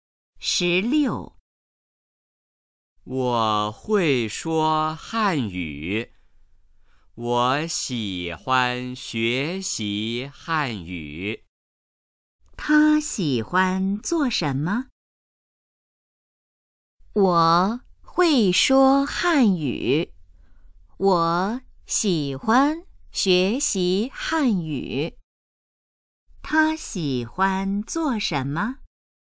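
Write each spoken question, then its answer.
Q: 他喜欢做什么?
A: 学习汉语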